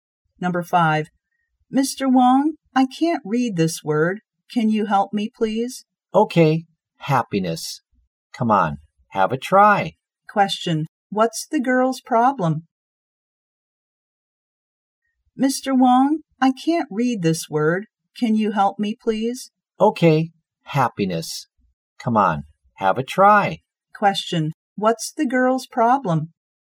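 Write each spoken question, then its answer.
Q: what's the girl's problem?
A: She can't read a word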